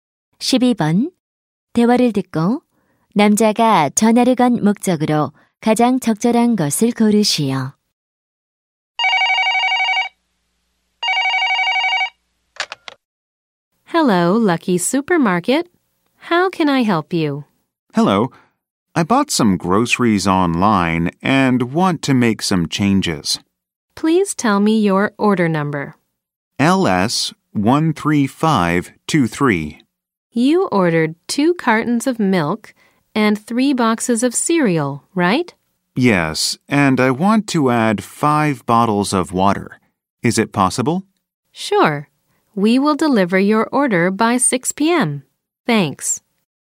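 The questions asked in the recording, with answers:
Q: 대화를 듣고 남자가 전화를 건 목적으로 가장 적절한 것을 고르시오.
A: 온라인 주문에 물품(물 5병)을 추가하려고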